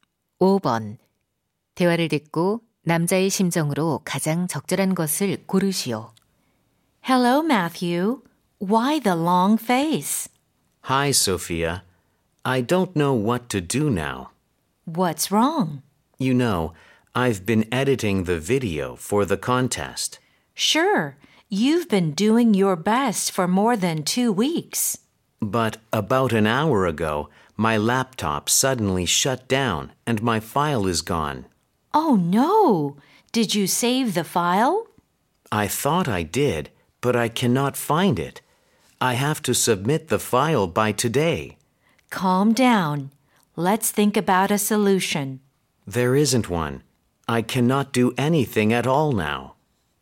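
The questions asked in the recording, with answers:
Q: 대화를 듣고 남자의 심정으로 가장 적절한 것을 고르시오.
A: 절망스러움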